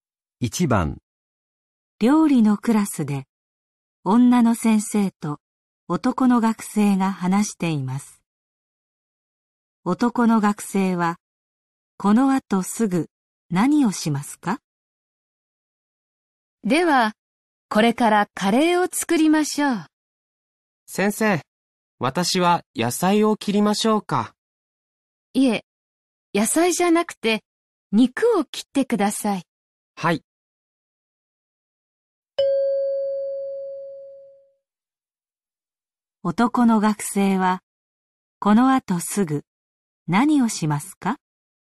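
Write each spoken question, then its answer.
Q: 男の学生は、この後すぐ、何をしますか?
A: 肉を切る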